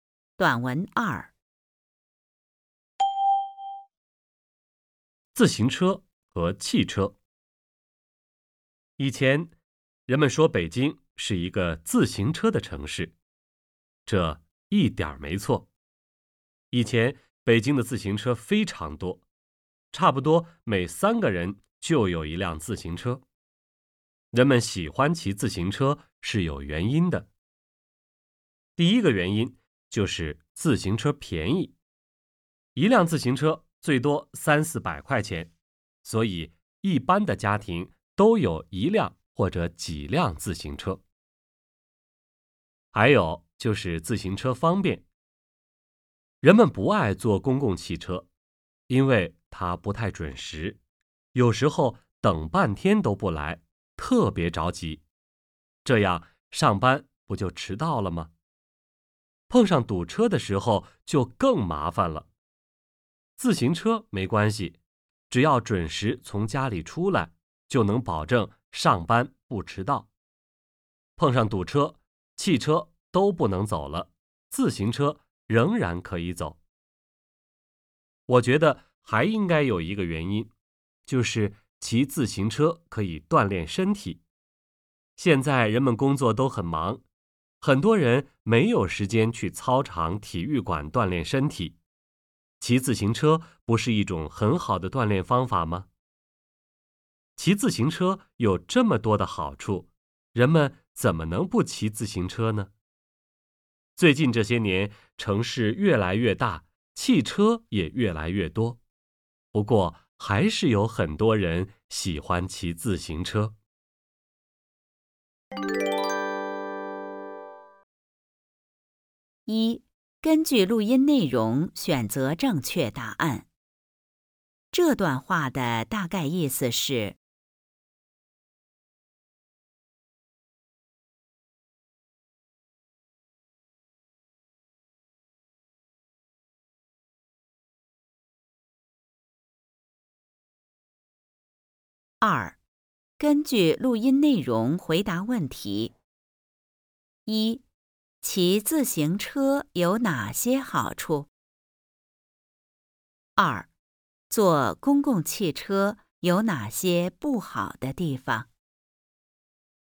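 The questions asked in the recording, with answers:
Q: 骑自行车有哪些好处?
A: 便宜、方便、不怕堵车、能准时上班、可以锻炼身体

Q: 坐公共汽车有哪些不好的地方?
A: 不太准时,有时等半天都不来,上班会迟到,碰上堵车更麻烦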